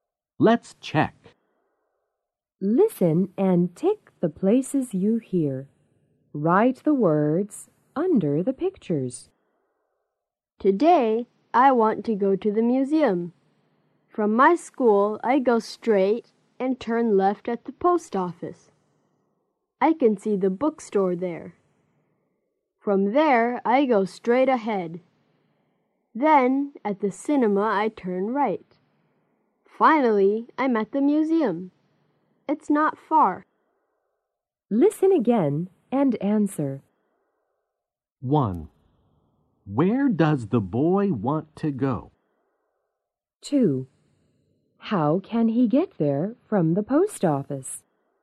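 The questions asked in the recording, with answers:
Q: Where does the boy want to go?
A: The museum.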